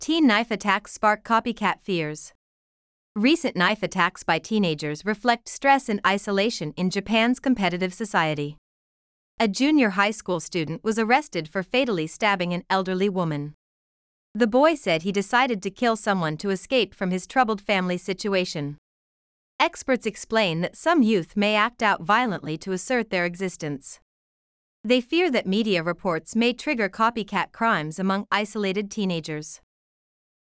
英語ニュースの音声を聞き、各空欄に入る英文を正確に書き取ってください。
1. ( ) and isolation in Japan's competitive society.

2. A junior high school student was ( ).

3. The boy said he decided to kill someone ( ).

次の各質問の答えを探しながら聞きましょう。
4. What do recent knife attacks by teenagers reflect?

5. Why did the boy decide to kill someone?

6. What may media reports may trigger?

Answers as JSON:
{"1": "Recent knife attacks by teenagers reflect stress", "2": "arrested for fatally stabbing an elderly woman", "3": "to escape from his troubled family situation", "4": "They reflect stress and isolation in Japan's competitive society.", "5": "To escape from his troubled family situation.", "6": "They may trigger copycat crimes among isolated teenagers."}

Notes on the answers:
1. ▶「knife」 を「night」と聞き間違えた。 ⇒ 英単語は語尾の子音が聞こえにくい場合があるため、文脈から意味を読み取る読解力が必要です。
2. ▶ 「fatally(致命的に)」という副詞に馴染みがなく、聞き取れなかった。 ⇒ 「fatal(致命的な)」という形容詞と合わせて覚えておきましょう。
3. ▶ 「troubled(形容詞:問題を抱えた)」の語尾が聞き取れず「trouble(名詞:トラブル)」と書いてしまった。 ⇒ 語末の子音[t]は音が止まってほとんど聞こえないため、文脈から単語を判断する読解力が必要です。

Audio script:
Teen knife attacks spark copycat fears
Recent knife attacks by teenagers reflect stress and isolation in Japan's competitive society.
A junior high school student was arrested for fatally stabbing an elderly woman.
The boy said he decided to kill someone to escape from his troubled family situation.
Experts explain that some youth may act out violently to assert their existence.
They fear that media reports may trigger copycat crimes among isolated teenagers.